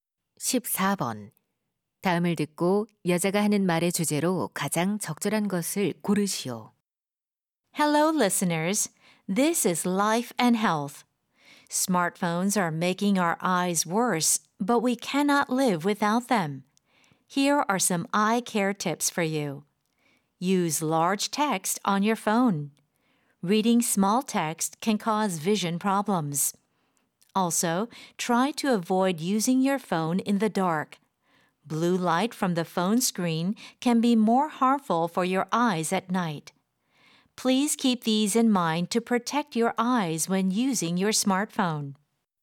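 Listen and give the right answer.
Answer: 스마트폰 사용 시 눈 건강을 지키는 방법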